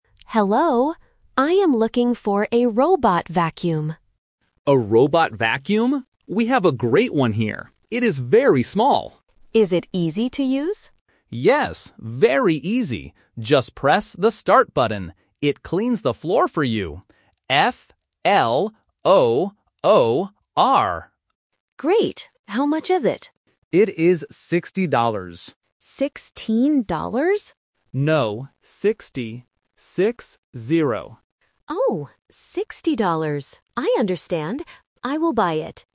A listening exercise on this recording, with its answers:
Listen to the conversation and choose the correct answer (A, B, or C).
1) What does the worker say about the robot vacuum?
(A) It is big.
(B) It is small.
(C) It is heavy.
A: It is small.

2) What word does the worker spell?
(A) R-O-B-O-T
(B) B-U-T-T-O-N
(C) F-L-O-O-R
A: F-L-O-O-R

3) How much is the robot vacuum?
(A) 60 dollars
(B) 16 dollars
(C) 6 dollars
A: 60 dollars

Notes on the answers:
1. The worker introduces the vacuum by saying, "It is very small."
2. The worker tells the customer that the robot cleans the floor and spells the word: "F-L-O-O-R".
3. The worker clearly states the price is 60 dollars ("Six - zero").

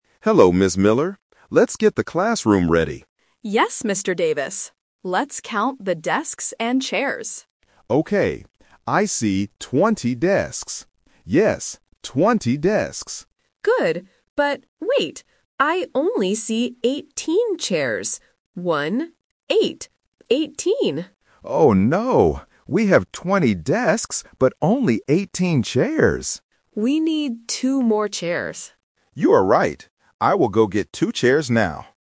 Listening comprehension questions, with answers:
Listen to the conversation and choose the correct answer (A, B, or C).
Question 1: What are the teachers counting?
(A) Books and pens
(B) Desks and chairs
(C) Computers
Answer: Desks and chairs

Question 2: How many desks are there in the classroom?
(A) 18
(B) 20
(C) 2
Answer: 20

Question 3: How many MORE chairs do they need?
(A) 2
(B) 18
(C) 20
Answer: 2

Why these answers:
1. Ms. Miller says clearly, "Let's count the desks and chairs." Option (A) and Option (C) are plausible objects in a classroom, but they are not mentioned in the audio.
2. Mr. Davis repeats the number twice: "I see twenty desks. Yes, twenty desks." Option (A) is the trap because 18 is the number of chairs, not desks. Option (C) is the number of extra chairs they need.
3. Ms. Miller says, "We need two more chairs." Option (B) is the trap (it is the number of chairs they currently have). Option (C) is the trap for the number of desks.

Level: A1

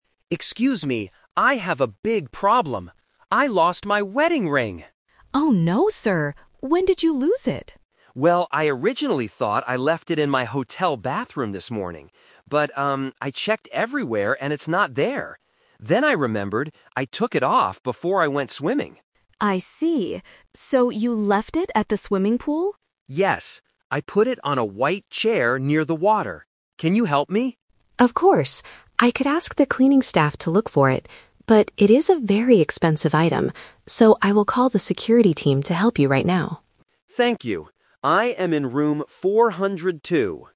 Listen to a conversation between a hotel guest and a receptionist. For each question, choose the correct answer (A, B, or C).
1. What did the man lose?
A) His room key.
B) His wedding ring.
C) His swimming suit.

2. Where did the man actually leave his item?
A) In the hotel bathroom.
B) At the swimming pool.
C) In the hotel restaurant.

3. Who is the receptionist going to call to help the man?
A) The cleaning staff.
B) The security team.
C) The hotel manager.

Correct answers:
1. His wedding ring.
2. At the swimming pool.
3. The security team.

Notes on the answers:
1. The guest says at the very beginning, "I lost my wedding ring!" (Option B - Key). Option A is a logical guess for a hotel problem but is not mentioned. Option C is a trap because he mentions "swimming" later, but he didn't lose his suit.
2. The guest says he "originally thought I left it in my hotel bathroom" (Option A - Trap). However, he uses "But" to show a change: he checked and it wasn't there. He finally remembers that he left it at the "swimming pool" (Option B - Key). Option C is not mentioned.
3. The receptionist says she could ask the "cleaning staff" (Option A - Trap). However, because the ring is expensive, she says, "So, I will call the security team to help you right now" (Option B - Key). Option C is a plausible distractor but is not mentioned in the audio.

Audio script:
Guest: Excuse me, I have a big problem. I lost my wedding ring!
Receptionist: Oh no, sir. When did you lose it?
Guest: Well, I originally thought I left it in my hotel bathroom this morning. But, um, I checked everywhere and it's not there. Then I remembered, I took it off before I went swimming.
Receptionist: I see. So you left it at the swimming pool?
Guest: Yes. I put it on a white chair near the water. Can you help me?
Receptionist: Of course. I could ask the cleaning staff to look for it. But, it is a very expensive item. So, I will call the security team to help you right now.

